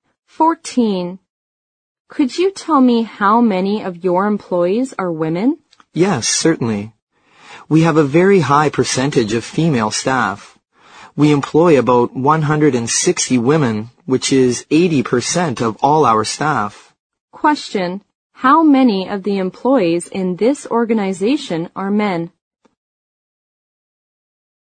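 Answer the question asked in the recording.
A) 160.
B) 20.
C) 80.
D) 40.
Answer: D) 40.

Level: 六级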